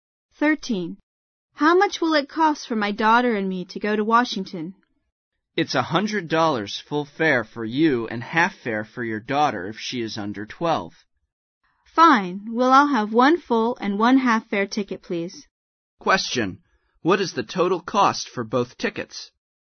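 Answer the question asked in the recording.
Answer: $150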